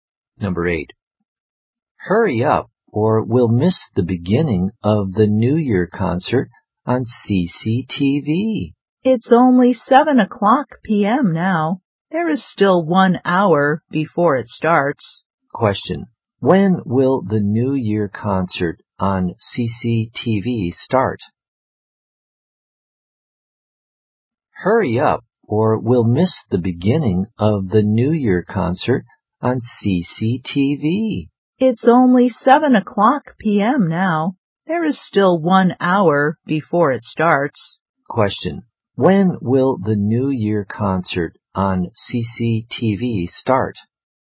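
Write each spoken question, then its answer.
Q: when will the New Year concert on CCTV start?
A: At 8 o'clock p.m.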